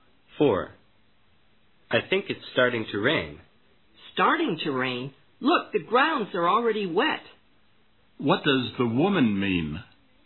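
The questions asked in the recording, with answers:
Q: What does the woman mean?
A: It has already been raining for a while.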